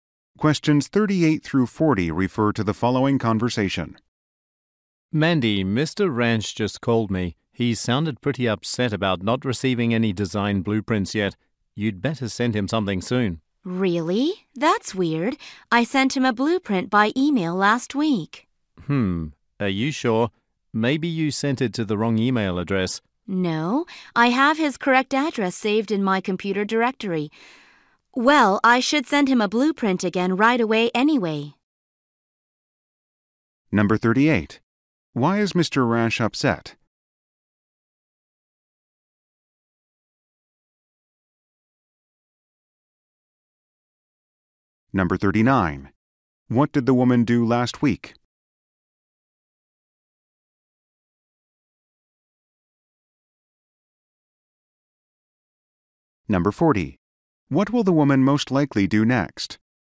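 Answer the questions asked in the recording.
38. He hasn't received any design blueprints
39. She emailed him a blueprint
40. Send the blueprint again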